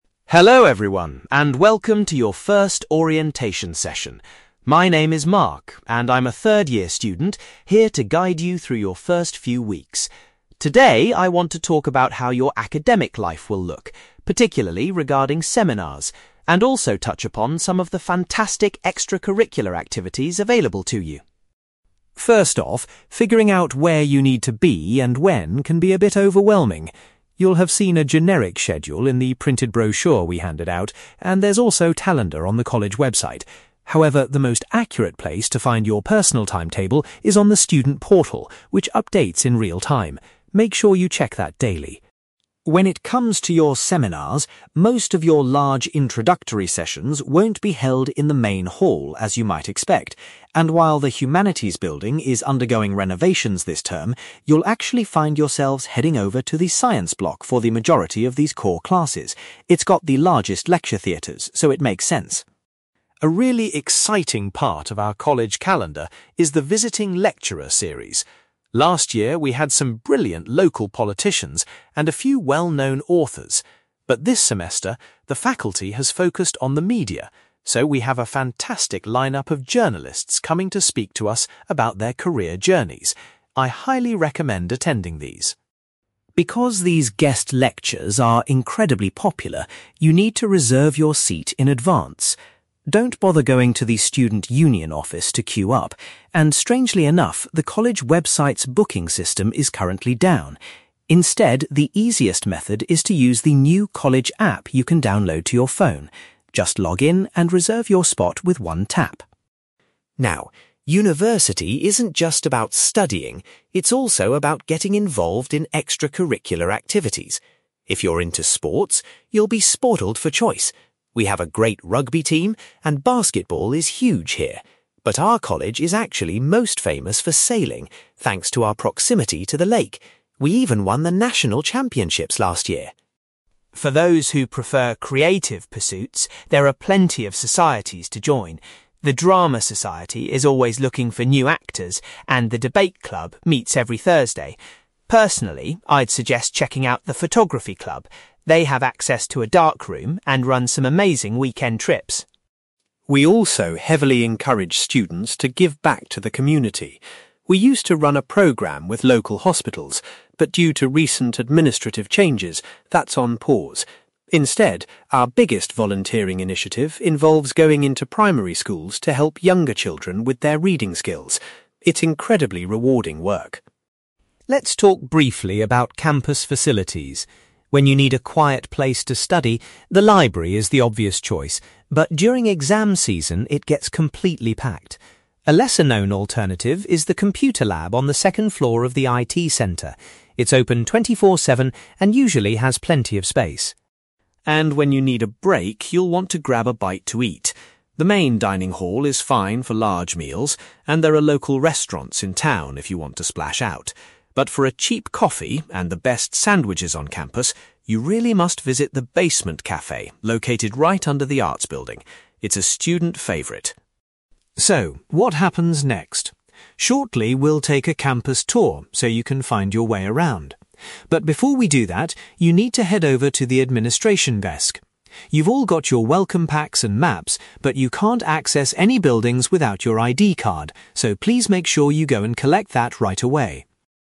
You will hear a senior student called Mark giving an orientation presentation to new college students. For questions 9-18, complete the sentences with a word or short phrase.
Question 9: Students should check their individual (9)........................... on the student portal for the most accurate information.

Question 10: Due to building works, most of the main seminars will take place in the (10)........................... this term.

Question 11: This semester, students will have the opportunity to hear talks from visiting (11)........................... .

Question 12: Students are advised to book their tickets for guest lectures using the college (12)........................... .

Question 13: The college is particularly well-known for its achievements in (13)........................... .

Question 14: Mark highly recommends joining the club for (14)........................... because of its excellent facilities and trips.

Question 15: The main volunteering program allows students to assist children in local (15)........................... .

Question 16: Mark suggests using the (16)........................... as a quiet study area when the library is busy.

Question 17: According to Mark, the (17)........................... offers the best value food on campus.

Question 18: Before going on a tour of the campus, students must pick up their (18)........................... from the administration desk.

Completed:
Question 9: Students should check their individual timetable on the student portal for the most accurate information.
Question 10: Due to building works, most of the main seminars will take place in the Science Block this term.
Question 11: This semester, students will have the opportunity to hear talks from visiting journalists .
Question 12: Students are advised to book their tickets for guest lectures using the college app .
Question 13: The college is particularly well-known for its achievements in sailing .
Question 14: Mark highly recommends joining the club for photography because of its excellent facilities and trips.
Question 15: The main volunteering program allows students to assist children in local primary schools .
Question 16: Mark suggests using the computer lab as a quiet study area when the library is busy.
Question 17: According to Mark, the basement cafe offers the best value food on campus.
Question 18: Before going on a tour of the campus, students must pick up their ID card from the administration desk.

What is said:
Mark: Hello everyone and welcome to your first orientation session. My name is Mark, and I'm a third-year student here to guide you through your first few weeks. Today, I want to talk about how your academic life will look, particularly regarding seminars, and also touch upon some of the fantastic extracurricular activities available to you.
First off, figuring out where you need to be and when can be a bit overwhelming. You'll have seen a generic schedule in the printed brochure we handed out, and there's also a calendar on the college website. However, the most accurate place to find your personal timetable is on the student portal, which updates in real-time. Make sure you check that daily.
When it comes to your seminars, most of your large introductory sessions won't be held in the Main Hall as you might expect. And while the Humanities building is undergoing renovations this term, you'll actually find yourselves heading over to the Science Block for the majority of these core classes. It's got the largest lecture theatres, so it makes sense.
A really exciting part of our college calendar is the visiting lecturer series. Last year we had some brilliant local politicians and a few well-known authors. But this semester, the faculty has focused on the media, so we have a fantastic lineup of journalists coming to speak to us about their career journeys. I highly recommend attending these.
Because these guest lectures are incredibly popular, you need to reserve your seat in advance. Don't bother going to the student union office to queue up, and strangely enough, the college website's booking system is currently down. Instead, the easiest method is to use the new college app you can download to your phone. Just log in and reserve your spot with one tap.
Now, university isn't just about studying; it's also about getting involved in extracurricular activities. If you're into sports, you'll be spoiled for choice. We have a great rugby team and basketball is huge here. But our college is actually most famous for sailing, thanks to our proximity to the lake. We even won the national championships last year!
For those who prefer creative pursuits, there are plenty of societies to join. The drama society is always looking for new actors, and the debate club meets every Thursday. Personally, I'd suggest checking out the photography club. They have access to a darkroom and run some amazing weekend trips.
We also heavily encourage students to give back to the community. We used to run a program with local hospitals, but due to recent administrative changes, that's on pause. Instead, our biggest volunteering initiative involves going into primary schools to help younger children with their reading skills. It's incredibly rewarding work.
Let's talk briefly about campus facilities. When you need a quiet place to study, the library is the obvious choice. But during exam season, it gets completely packed. A lesser-known alternative is the computer lab on the second floor of the IT center. It's open 24/7 and usually has plenty of space.
And when you need a break, you'll want to grab a bite to eat. The main dining hall is fine for large meals, and there are local restaurants in town if you want to splash out. But for a cheap coffee and the best sandwiches on campus, you really must visit the basement cafe located right under the arts building. It's a student favorite.
So, what happens next? Shortly, we'll take a campus tour so you can find your way around. But before we do that, you need to head over to the administration desk. You've all got your welcome packs and maps, but you can't access any buildings without your ID card, so please make sure you go and collect that right away.

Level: B2